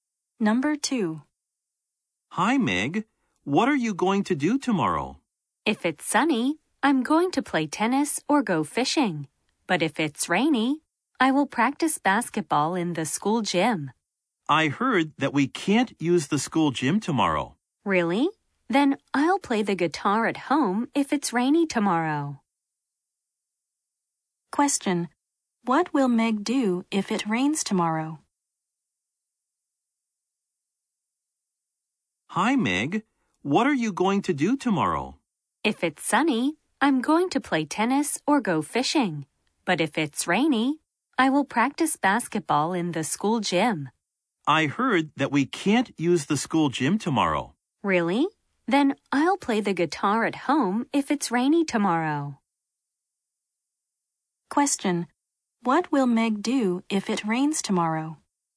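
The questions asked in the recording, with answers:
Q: What will Meg do if it rains tomorrow?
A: Play the guitar at home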